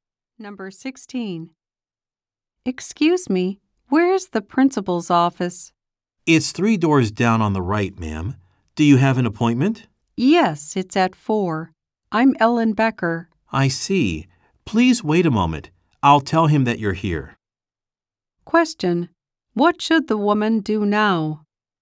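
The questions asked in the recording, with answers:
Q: What should the woman do now?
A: Wait a moment.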